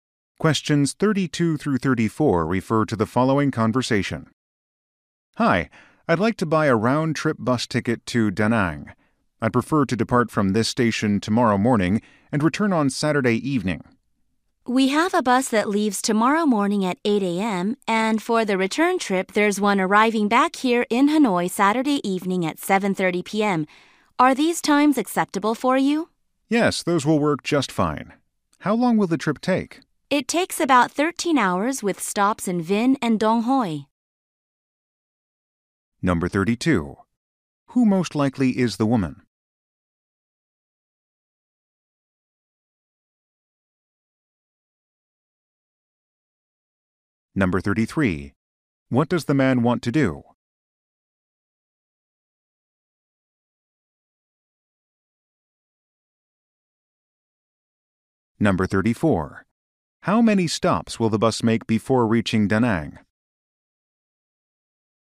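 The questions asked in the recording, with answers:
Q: How many stops will the bus make before reaching Da Nang?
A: Two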